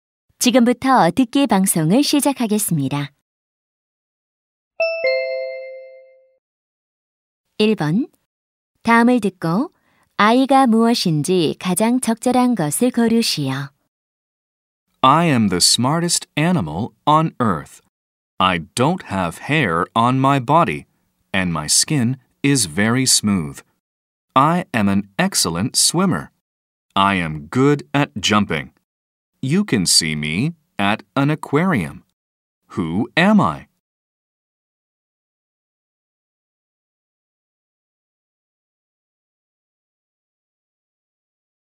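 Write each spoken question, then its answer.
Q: 다음을 듣고 아이가 무엇인지 가장 적절한 것을 고르시오.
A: 돌고래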